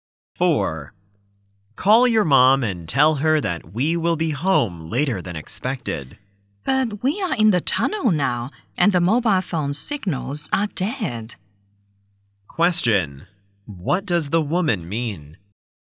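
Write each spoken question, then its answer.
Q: What does the woman mean?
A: She can't call because there is no phone signal in the tunnel.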